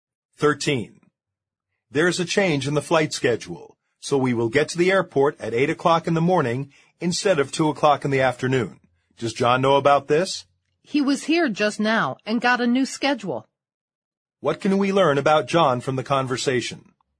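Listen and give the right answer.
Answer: He already knows about the schedule change.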